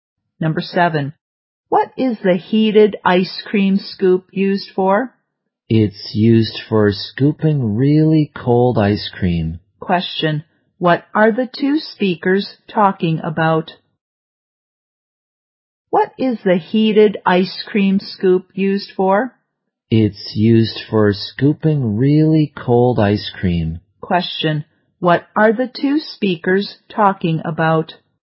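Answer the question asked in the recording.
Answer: The heated ice cream scoop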